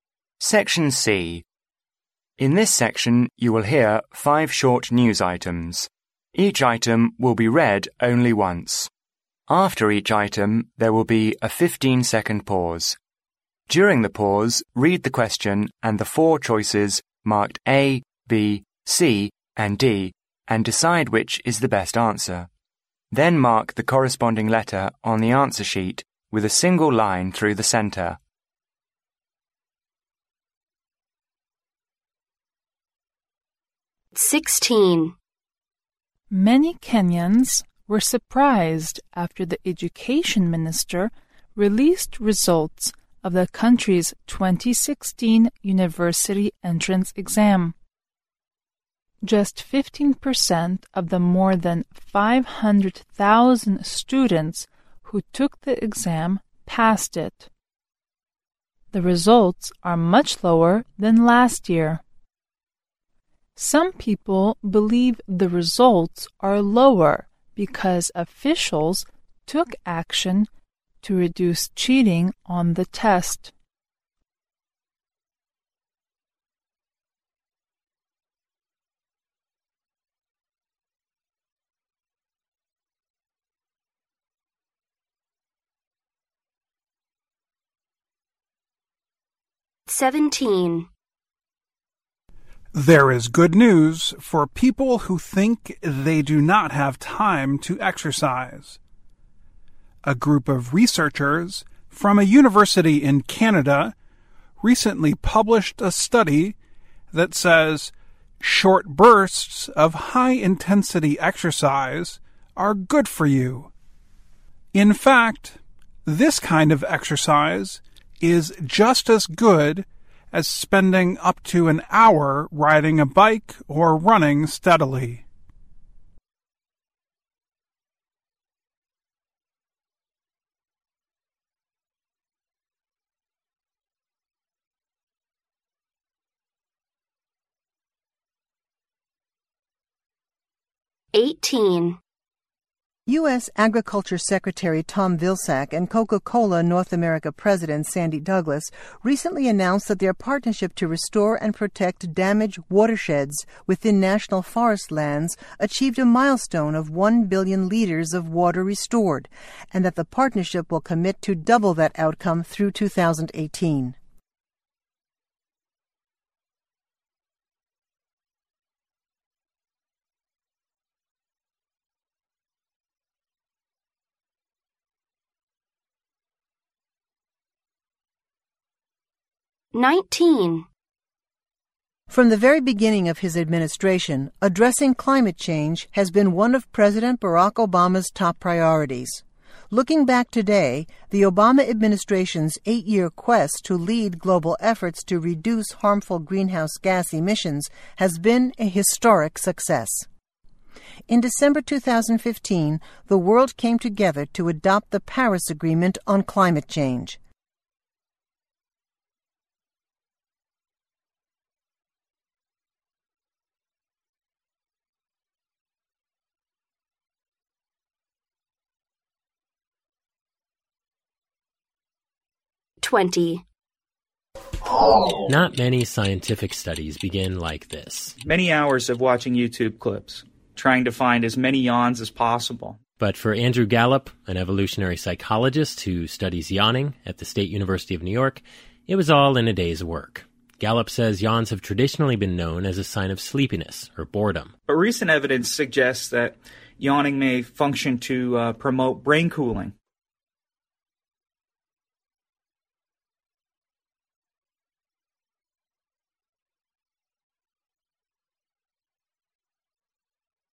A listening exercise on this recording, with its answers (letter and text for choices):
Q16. Why are the results of Kenya's 2016 university entrance exam lower than 2015?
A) Most students didn't work hard before the exam.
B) The exam has become more and more difficult.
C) Action has been taken to prevent students from cheating.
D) There is something wrong with the statistics on the exam.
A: C) Action has been taken to prevent students from cheating.

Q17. What is found to be good for health in the recent study?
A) Doing short bursts of intense exercise.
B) Practicing yoga from time to time.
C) Jogging for half an hour every day.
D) Raising one's legs when sitting in a chair.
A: A) Doing short bursts of intense exercise.

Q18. How much water will the partnership commit to restore through 2018?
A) One million liters.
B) Two million liters.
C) One billion liters.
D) Two billion liters.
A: D) Two billion liters.

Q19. What historic achievement has the Obama Administration made?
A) The rate of campus crime has been much lowered.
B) Harmful greenhouse gas emissions have been reduced.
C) The salary of most employees has been improved.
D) The citizens of the US have become more united.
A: B) Harmful greenhouse gas emissions have been reduced.

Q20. How did psychologist Andrew Gallup start his research on yawning?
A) By watching YouTube videos for many hours.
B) By forcing himself to yawn for a long time.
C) By observing students who yawn in class.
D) By talking with people who yawn a lot.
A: A) By watching YouTube videos for many hours.

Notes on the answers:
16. 新闻结尾点明了Kenya的大学2016年录取率低于2015年的原因:"... because official took action to reduce cheating on the test."由此可知,官方采取了防止学生作弊的措施导致录取率下降。故选C项。
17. 新闻内容表明研究人员近期发表报告表明"short bursts of high-intensity exercise are good for you",即短时间爆发性高强度运动对人体健康有好处。故选A项。
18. 新闻提及美国农业部与可口可乐北美达成了伙伴关系,"their partnership to restore and protect damaged watersheds...achieved a milestone of one billion liters of water restored"这种伙伴关系帮助恢复了十亿公升水资源,而在2018年他们承诺这个数字要翻一倍,即达到20亿公升。故选D项。
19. 新闻提到"the Obama Administration's eight year quest to lead global efforts to reduce harmful greenhouse gas emissions has been a historic success",由此可知奥巴马政府在减少有害温室气体排放的工作方面取得巨大成功。故选B项。